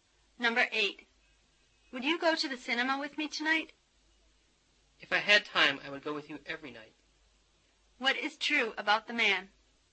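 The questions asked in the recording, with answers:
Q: What is true about the man?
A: He has no time to go to the cinema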